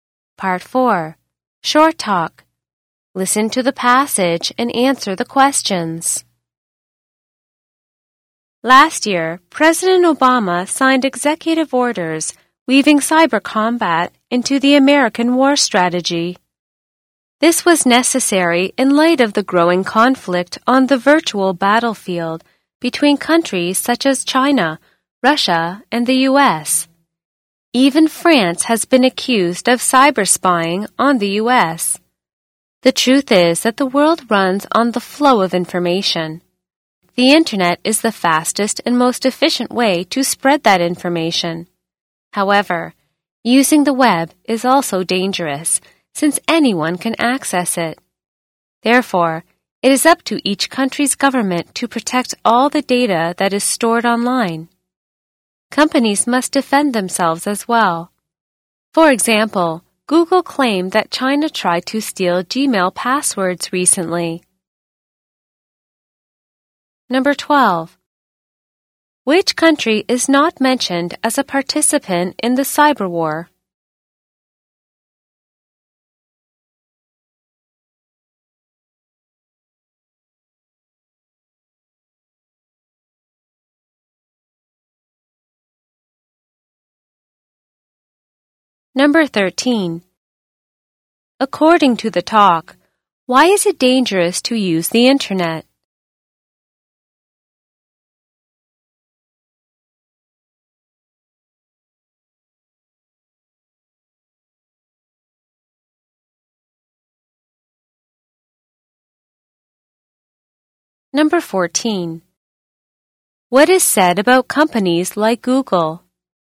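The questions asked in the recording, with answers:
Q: According to the talk, why is it dangerous to use the Internet?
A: Because anyone can access it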